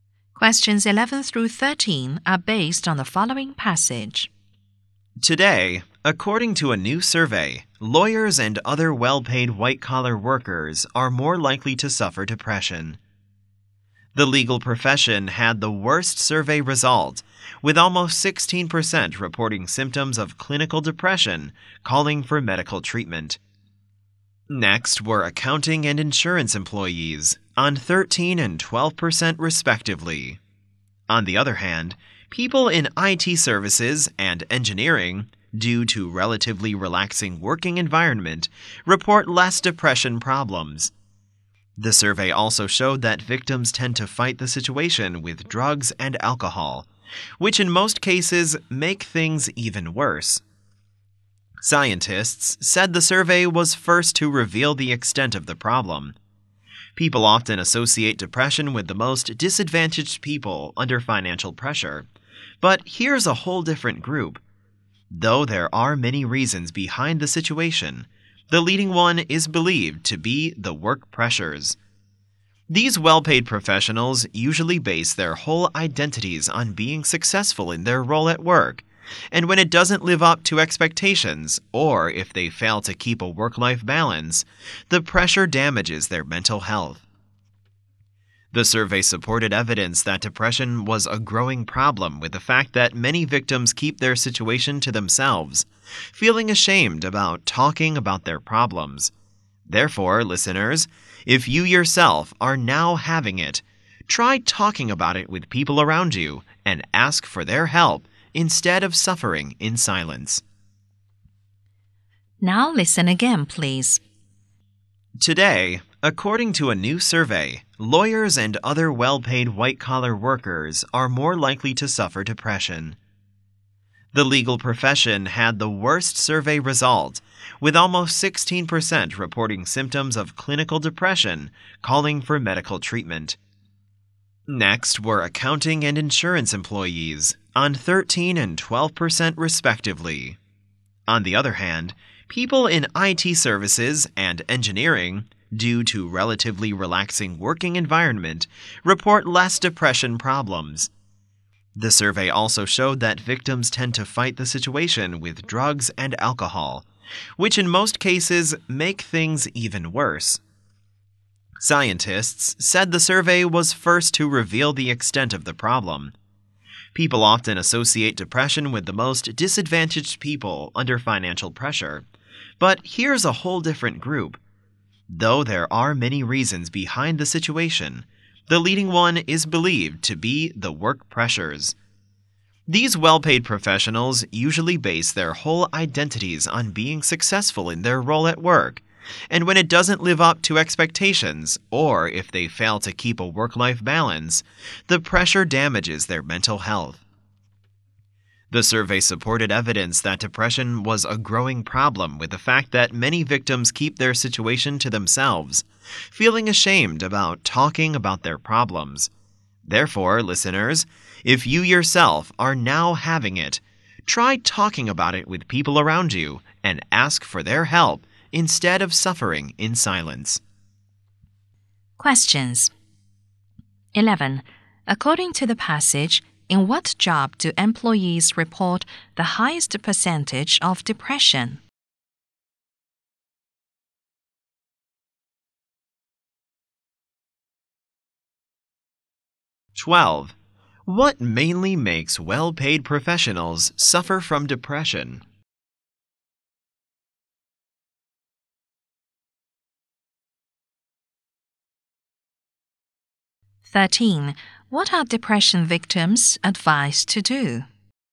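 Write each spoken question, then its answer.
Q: According to the passage, in what job do employees report the highest percentage of depression?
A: Lawyers (the legal profession)

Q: What mainly makes well-paid professionals suffer from depression?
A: Work pressure

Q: What are depression victims advised to do?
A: Talk about it with people around them and ask for help.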